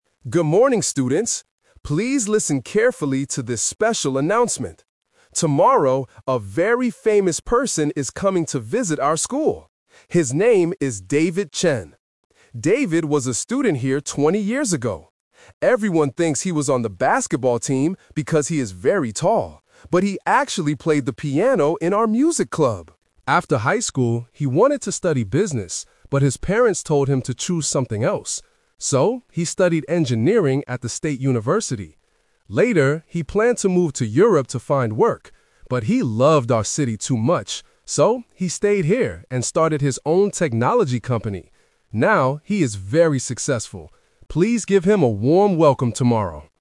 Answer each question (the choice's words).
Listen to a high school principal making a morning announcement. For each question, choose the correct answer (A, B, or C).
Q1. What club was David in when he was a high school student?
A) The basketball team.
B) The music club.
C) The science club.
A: The music club.

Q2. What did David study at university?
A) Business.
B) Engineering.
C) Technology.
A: Engineering.

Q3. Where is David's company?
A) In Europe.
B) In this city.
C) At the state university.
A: In this city.

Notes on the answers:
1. The principal says, "...he actually played the piano in our music club." Why the traps are wrong: Option A is a "Twist Trap". People think he was on the basketball team because he is tall, but he wasn't. Option C is not mentioned in the audio.
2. The principal explains his major: "So, he studied engineering at the state university." Why the traps are wrong: Option A is a trap because he wanted to study business, but he chose something else. Option C is the type of company he opened later, not his university major.
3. The principal says David stayed here (in the city): "So, he stayed here and started his own technology company." Why the traps are wrong: Option A is a "Twist Trap". He planned to move to Europe, but he didn't. Option C is where he studied, not where his company is located.

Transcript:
Principal: Good morning, students! Please listen carefully to this special announcement. Tomorrow, a very famous person is coming to visit our school. His name is David Chen.
David was a student here twenty years ago. Everyone thinks he was on the basketball team because he is very tall, but he actually played the piano in our music club.
After high school, he wanted to study business, but his parents told him to choose something else. So, he studied engineering at the state university.
Later, he planned to move to Europe to find work. But he loved our city too much. So, he stayed here and started his own technology company.